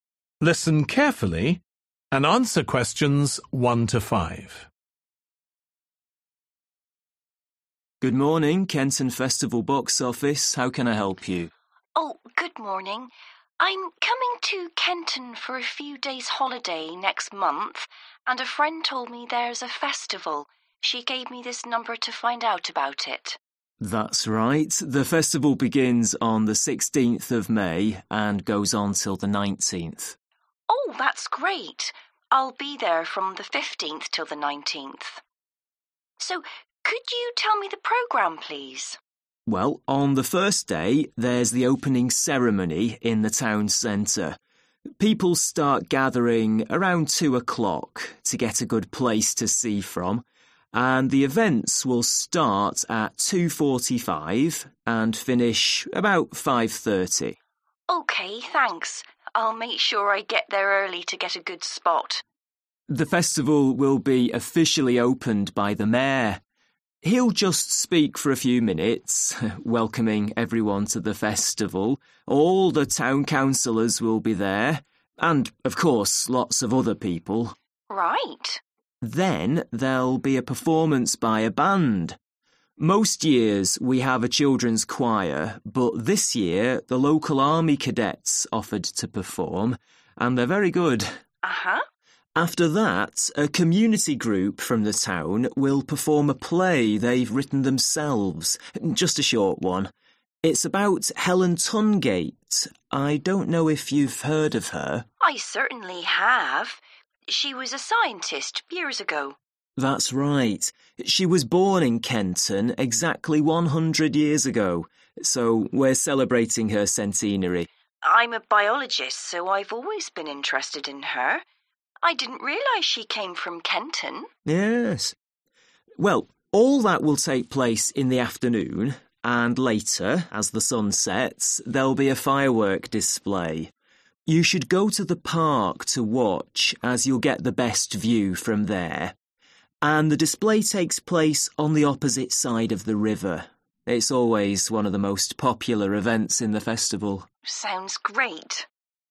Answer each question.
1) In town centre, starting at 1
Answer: 2:45

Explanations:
People start gathering around 2 o'clock, to get a good place to see from, and the events will start at 2.45 (Mọi người bắt đầu tập trung vào khoảng 2 giờ, để có được một địa điểm tốt để xem và các sự kiện sẽ bắt đầu lúc 2 giờ 45)

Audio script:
MAN: Good morning, Kenton Festival box office. How can I help you?
WOMAN: Oh, good morning. I'm coming to Kenton for a few days' holiday next month, and a friend told me there's a festival. She gave me this number to find out about it.
MAN: That's right, the festival begins on the 16th of May (Example) and goes on till the 19th.
WOMAN: Oh, that's great. I'll be there from the 15th till the 19th. So could you tell me the programme, please?
MAN: Well, on the first day, there's the opening ceremony, in the town center.
WOMAN: OK, thanks. I'll make sure I get there early to get a good spot.
MAN: The festival will be officially opened by the mayor. He'll just speak for a few minutes, welcoming everyone to the festival. All the town councilors will be there, and of course lots of other people.
WOMAN: Right.
Most years we have a children's choir, but this year the local army cadets offered to perform, and they're very good.WOMAN: Uhuh.
MAN: (Q3) After that, a community group from the town will perform a play they've written themselves, just a short one. I don't know if you've heard of her?
WOMAN: I certainly have. (Q4) She was a scientist years ago.(Chắc chắn rồi .
MAN: That's right. She was born in Kenton exactly 100 years ago, so we're celebrating her centenary.
WOMAN: I'm a biologist, so I've always been interested in her. I didn't realize she came from Kenton.
MAN: Yes. Well, all that will take place in the afternoon, (Q5) and later, as the sun sets, there'll be a firework display. You should go to the park to watch, as you'll get the best view from there, and the display takes place on the opposite side of the river (và sau đó, khi mặt trời lặn, sẽ có màn bắn pháo hoa.